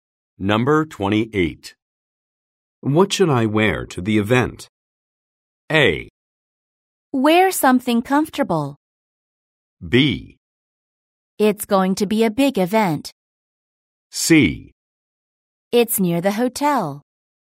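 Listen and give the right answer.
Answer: A: Wear something comfortable.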